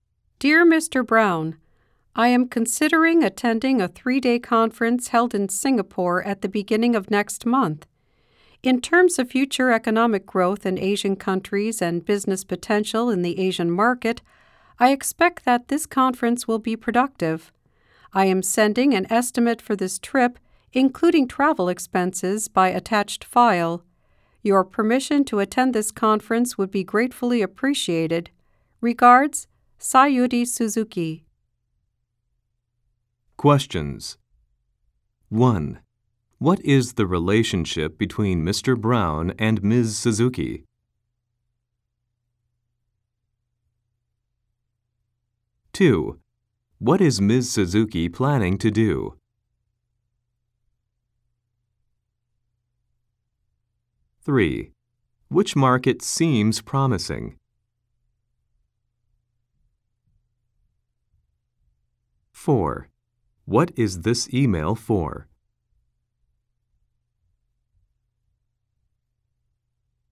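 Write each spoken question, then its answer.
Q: What is Ms. Suzuki planning to do?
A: Attend a 3-day conference in Singapore at the beginning of next month.

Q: Which market seems promising?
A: The Asian market.

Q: What is this email for?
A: To ask for permission to attend the conference.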